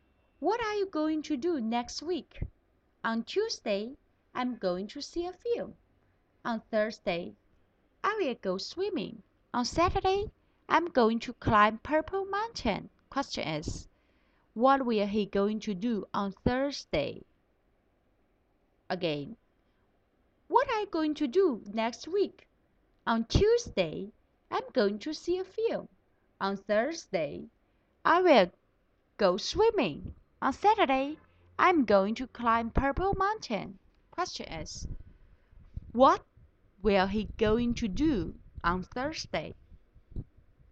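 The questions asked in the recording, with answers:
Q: what will he going to do on Thursday?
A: Go swimming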